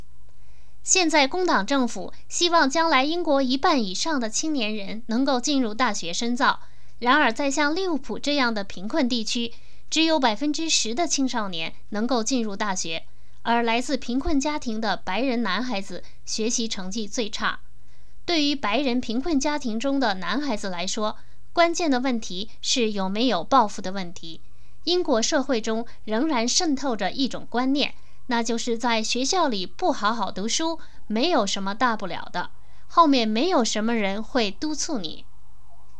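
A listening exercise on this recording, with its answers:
Please answer the following questions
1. 工党政府希望多少青年人上大学?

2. 孩子们学习不好的原因是什么?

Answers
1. 一半以上
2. 缺乏抱负;社会上认为在学校不好好读书没什么大不了,也没有人督促。

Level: 3rd Year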